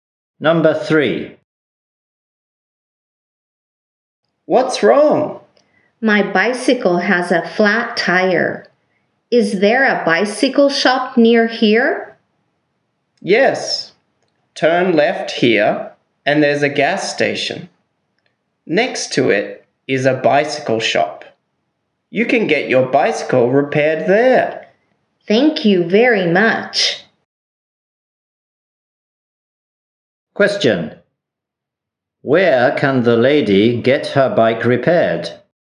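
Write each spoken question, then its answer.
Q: Where can the lady get her bike repaired?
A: At the bicycle shop next to the gas station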